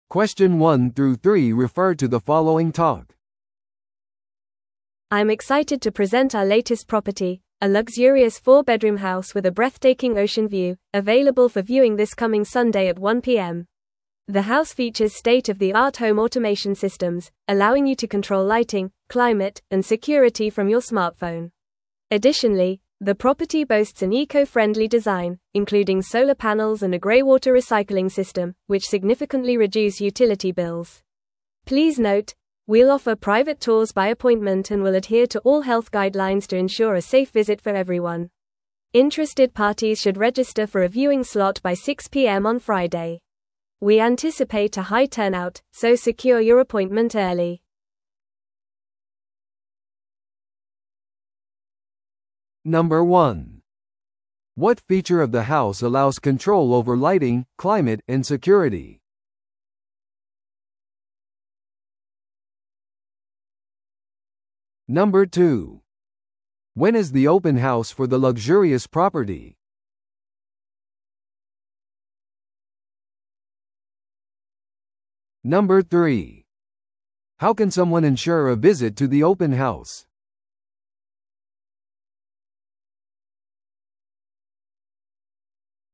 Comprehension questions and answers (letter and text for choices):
Listen to the audio below and answer the questions.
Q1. What feature of the house allows control over lighting, climate, and security?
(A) エコフレンドリーな材料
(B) 太陽光パネル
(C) ホームオートメーションシステム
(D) グレイウォーターリサイクル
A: (C) ホームオートメーションシステム

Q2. When is the open house for the luxurious property?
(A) 今週の日曜日の1pm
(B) 次の火曜日の10am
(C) 土曜の朝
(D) 金曜日の6pmまでに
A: (A) 今週の日曜日の1pm

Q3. How can someone ensure a visit to the open house?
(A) 見学時間中に直接来場する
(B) 公開ツアーを待つ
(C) 事前に物件を購入する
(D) 金曜日の6pmまでに見学枠の予約をする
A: (D) 金曜日の6pmまでに見学枠の予約をする

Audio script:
I'm excited to present our latest property, a luxurious 4-bedroom house with a breathtaking ocean view, available for viewing this coming Sunday at 1pm. The house features state-of-the-art Home Automation systems, allowing you to control lighting, climate, and security from your smartphone. Additionally, the property boasts an eco-friendly design, including solar panels and a greywater recycling system, which significantly reduce utility bills. Please note, we'll offer private tours by appointment and will adhere to all health guidelines to ensure a safe visit for everyone. Interested parties should register for a viewing slot by 6pm on Friday. We anticipate a high turnout, so secure your appointment early.